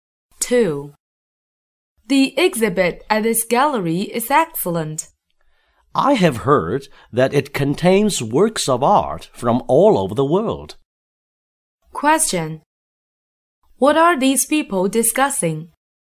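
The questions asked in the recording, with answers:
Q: What are these people discussing?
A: An art exhibition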